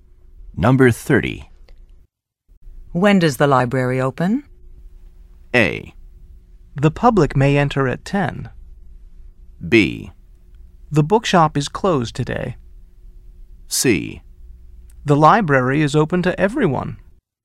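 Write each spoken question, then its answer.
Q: When does the library open?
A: A: The public may enter at 10.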